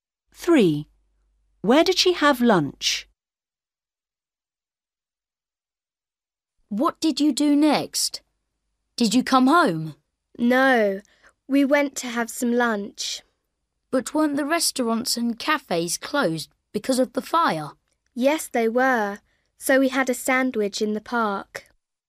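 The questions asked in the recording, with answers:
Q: Where did she have lunch?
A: in the park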